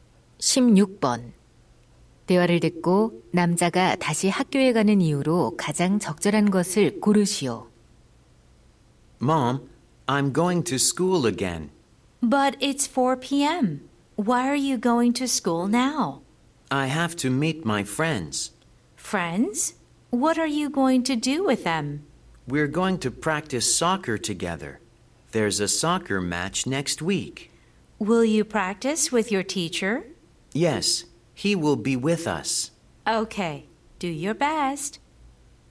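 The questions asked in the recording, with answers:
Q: 대화를 듣고 남자가 다시 학교에 가는 이유로 가장 적절한 것을 고르시오.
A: 친구들과 축구 연습을 하려고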